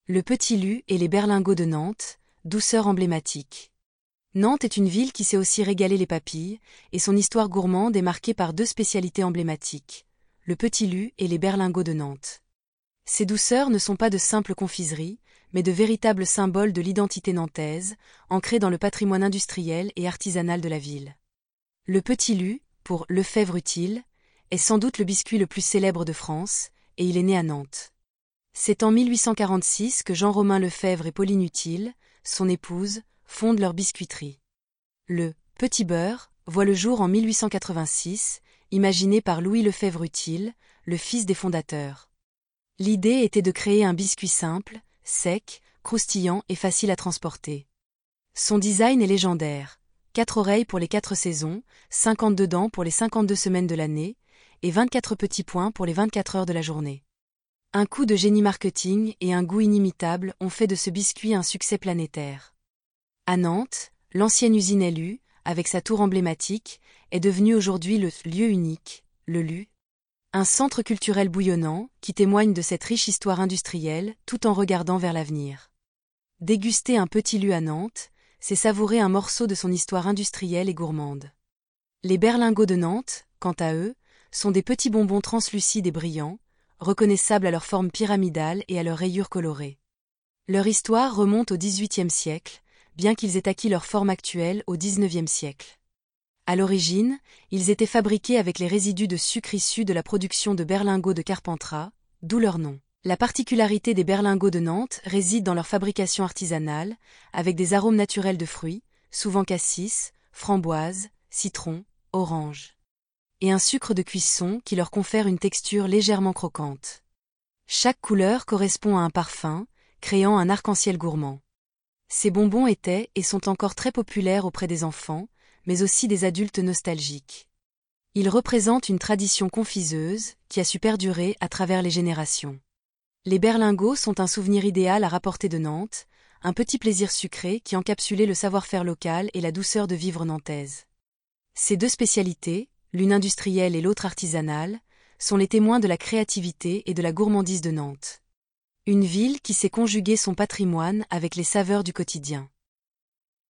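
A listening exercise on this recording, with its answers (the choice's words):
Écoutez l'enregistrement et cochez la bonne réponse.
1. Qui sont les fondateurs de la biscuiterie LU ?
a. Louis Pasteur et Marie Curie.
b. Jean-Romain Lefèvre et Pauline Utile.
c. Jules Verne et Léonard de Vinci.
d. Jean-Romain Utile et Pauline Lefèvre.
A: Jean-Romain Lefèvre et Pauline Utile.

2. Quand le biscuit "Petit Beurre" a-t-il été créé ?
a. En 1986.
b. En 1886.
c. En 1846.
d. Au début du XVIIIe siècle.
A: En 1886.

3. Qu'est-ce que l'ancienne usine LU est devenue aujourd'hui ?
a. Un musée d'art contemporain.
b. Un grand centre commercial.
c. Un centre culturel appelé le "Lieu Unique".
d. Un parking souterrain.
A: Un centre culturel appelé le "Lieu Unique".

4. Quelle est la forme caractéristique des Berlingots de Nantes ?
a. Ronde et plate.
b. Carrée et bombée.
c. Pyramidale et rayée.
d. Allongée et cylindrique.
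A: Pyramidale et rayée.

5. Quels types d'arômes sont souvent utilisés pour les Berlingots de Nantes ?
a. Des arômes artificiels de légumes.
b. Des arômes naturels de fruits.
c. Des arômes épicés.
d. Des arômes de chocolat.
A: Des arômes naturels de fruits.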